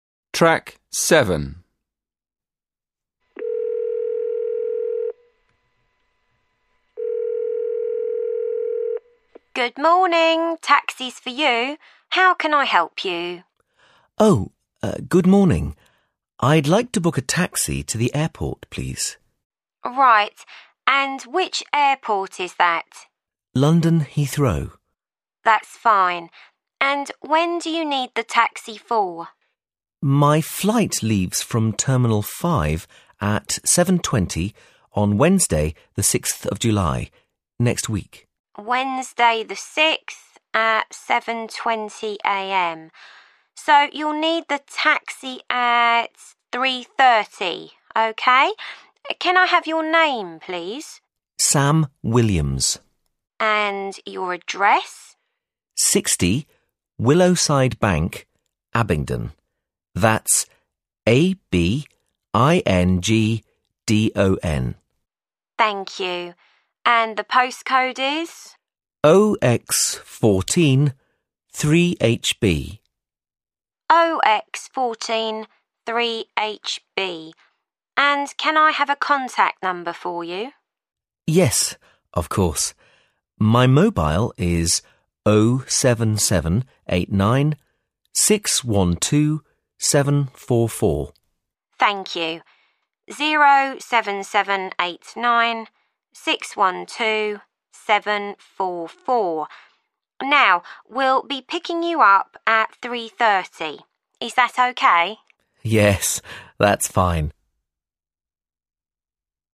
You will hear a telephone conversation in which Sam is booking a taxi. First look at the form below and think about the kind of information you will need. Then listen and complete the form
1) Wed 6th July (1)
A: 3.30 a.m

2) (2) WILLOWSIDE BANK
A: 60

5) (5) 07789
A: 612744

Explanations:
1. Thông tin bị thiếu nằm sau ngày tháng cụ thể là khoảng thời gian, vào giờ giấc nào nhất định. So sánh với câu tương ứng trong bài nghe "So you'll need the taxi at ... 3.30" => đáp án là 3.30 a.m
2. Thông tin bị thiếu đằng sau là một số nhà, số căn hộ nào đó cụ thể (thông tin cần điền chỉ có chữ số). So sánh với câu tương ứng trong bài nghe "60, Willowside Bank, Abingdon." => đáp án là 60
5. Thông tin bị thiếu đằng sau là chữ số để hoàn thiện số điện thoại di động. So sánh với câu tương ứng trong bài nghe "My mobile is 07789612744" => đáp án là 612744